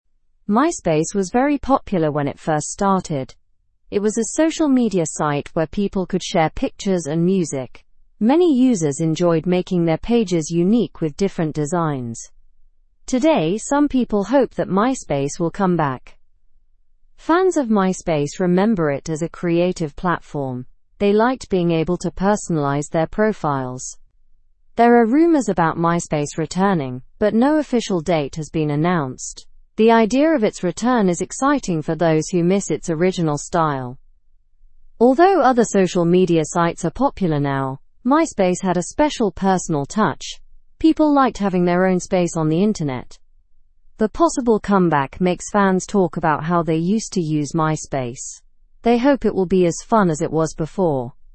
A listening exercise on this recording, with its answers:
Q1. What was special about MySpace when it first launched?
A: It allowed users to share pictures and music, making their pages unique.

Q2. How do fans remember MySpace?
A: They remember it as a creative platform where they could personalize their profiles.

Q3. Is there an official date for MySpace's return?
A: No, there is no official date announced.

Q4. How do people feel about the idea of MySpace making a comeback?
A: Some people are excited about the possibility.

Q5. What makes MySpace different from other current social media sites?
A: MySpace had a unique personal touch and allowed more personalization.

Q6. What did MySpace offer its users that was unique?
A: It offered the ability to personalize pages with different designs.

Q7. Why is the idea of MySpace returning exciting to fans?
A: Fans miss the site's original style and unique features.

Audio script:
MySpace was very popular when it first started. It was a social media site where people could share pictures and music. Many users enjoyed making their pages unique with different designs. Today, some people hope that MySpace will come back.
Fans of MySpace remember it as a creative platform. They liked being able to personalize their profiles. There are rumors about MySpace returning, but no official date has been announced. The idea of its return is exciting for those who miss its original style.
Although other social media sites are popular now, MySpace had a special personal touch. People liked having their own space on the internet. The possible comeback makes fans talk about how they used to use MySpace. They hope it will be as fun as it was before.

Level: (Level 2)